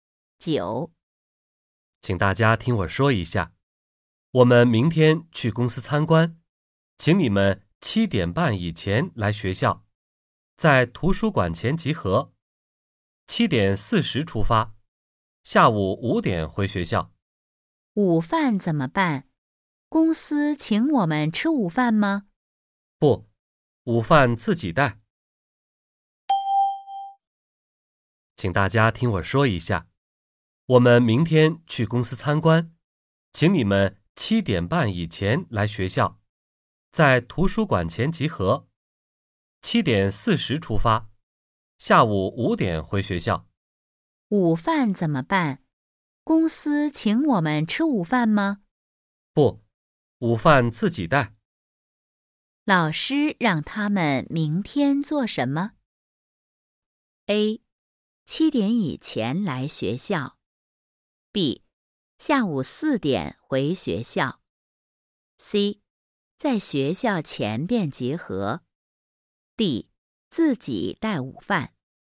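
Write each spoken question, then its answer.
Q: 老师让他们明天做什么?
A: D: 自己带午饭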